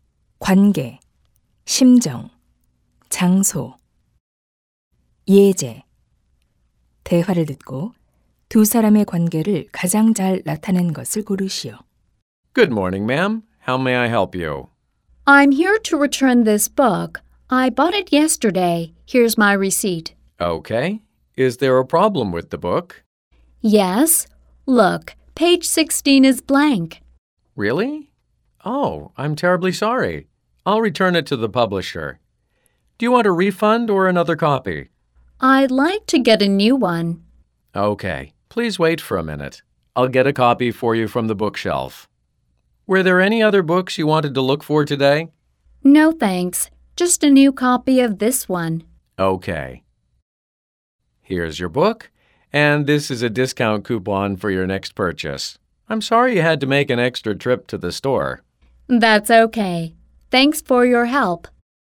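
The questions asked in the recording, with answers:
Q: 대화를 듣고 두 사람의 관계를 가장 잘 나타낸 것을 고르시오.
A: 서점 직원 - 손님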